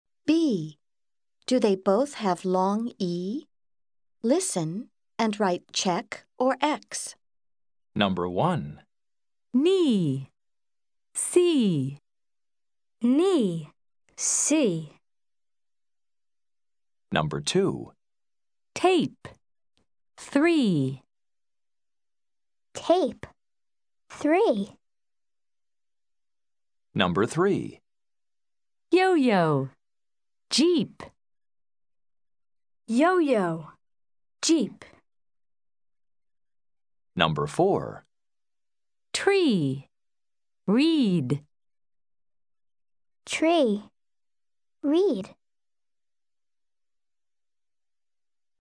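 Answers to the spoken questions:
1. Yes (check): knee and C both have long E
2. No (X): tape does not have long E
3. No (X): yo-yo does not have long E
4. Yes (check): tree and read both have long E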